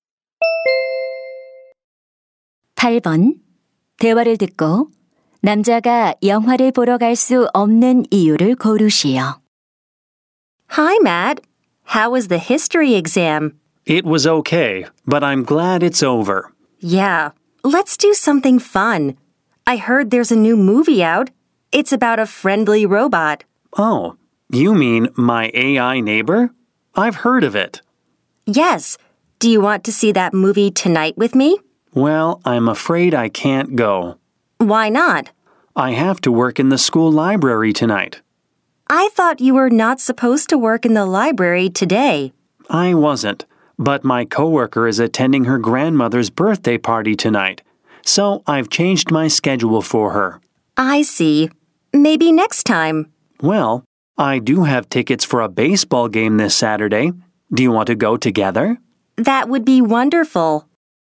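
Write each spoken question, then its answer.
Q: 대화를 듣고 남자가 영화를 보러 갈 수 없는 이유를 고르시오.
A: 동료 대신 학교 도서관에서 일해야 해서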